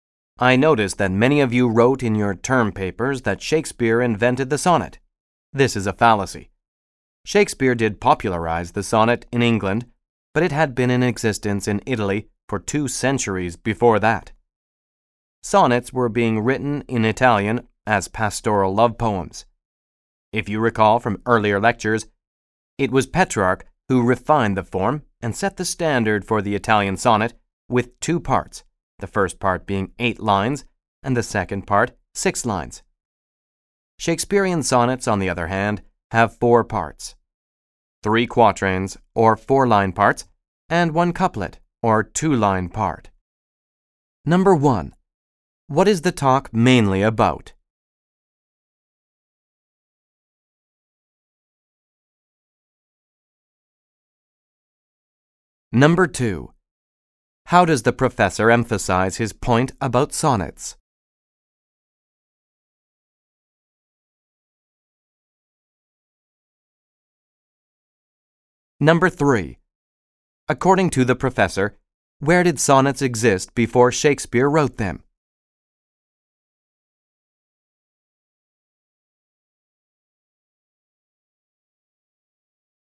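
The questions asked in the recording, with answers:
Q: According to the professor, where did sonnets exist before Shakespeare wrote them?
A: In Italy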